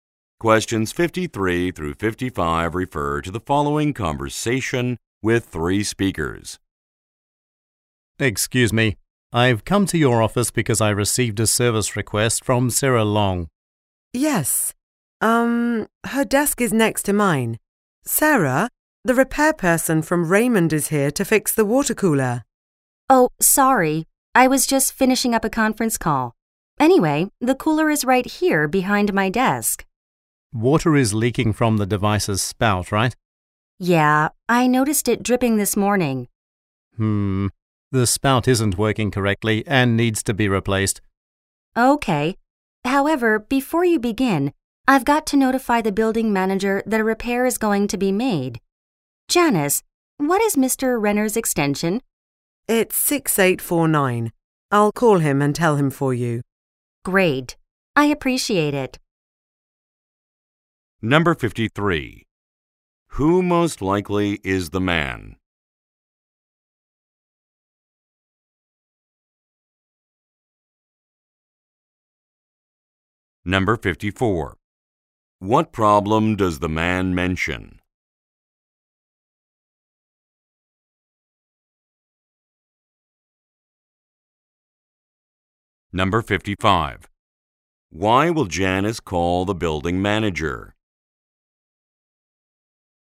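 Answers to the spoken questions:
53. A repair person
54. The spout is leaking and needs replacing
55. To tell him about the repair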